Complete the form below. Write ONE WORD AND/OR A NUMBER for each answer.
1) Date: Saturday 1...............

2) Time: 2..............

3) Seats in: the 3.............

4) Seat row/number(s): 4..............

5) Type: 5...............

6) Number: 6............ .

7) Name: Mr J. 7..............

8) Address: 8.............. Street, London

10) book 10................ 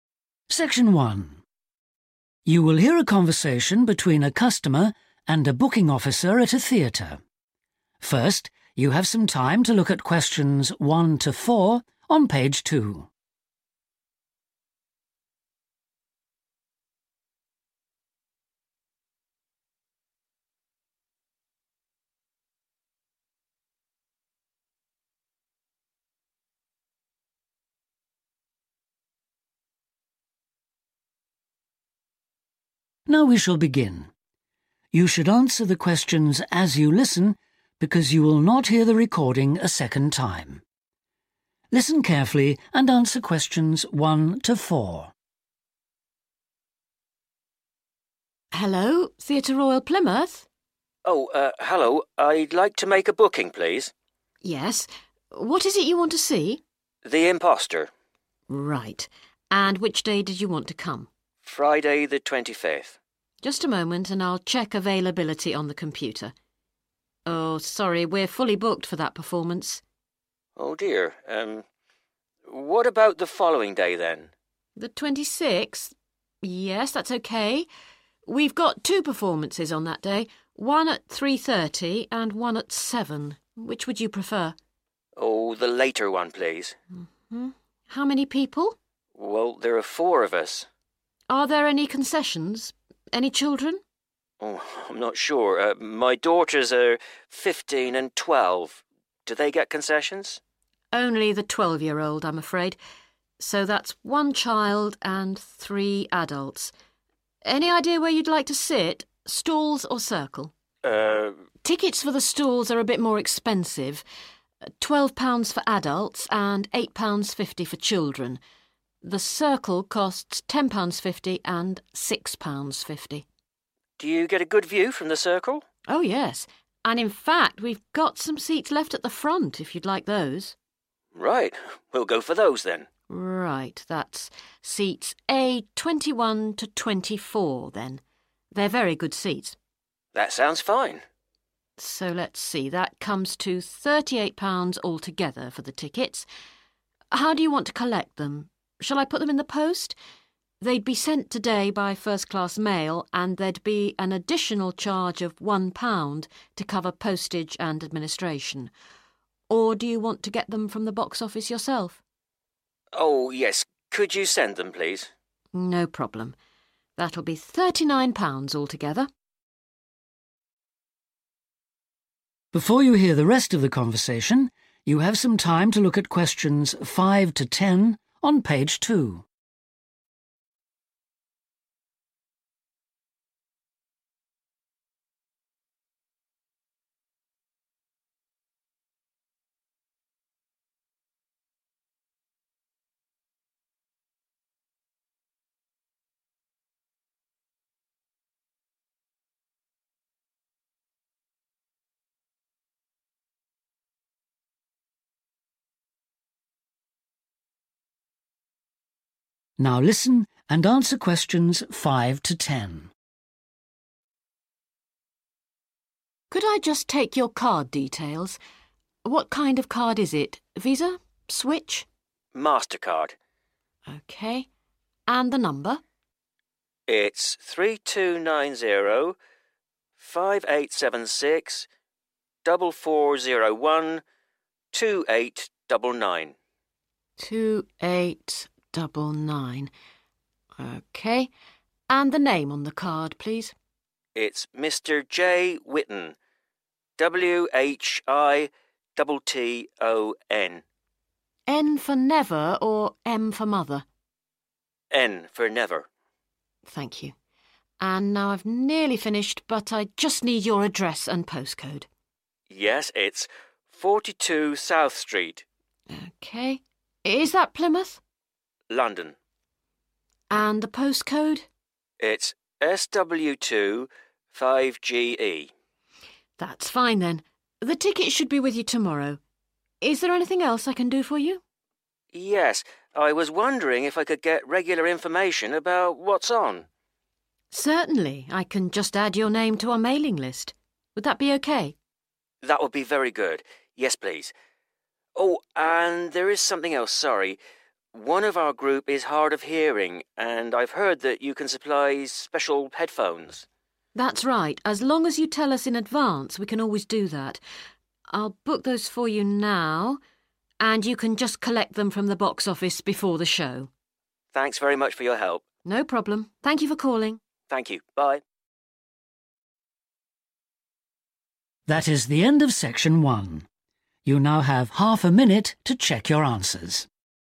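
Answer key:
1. 26th
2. 7
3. circle
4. A21-24
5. MasterCard
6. 3290 5876 4401 2899
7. Whitton
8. 42 South
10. headphones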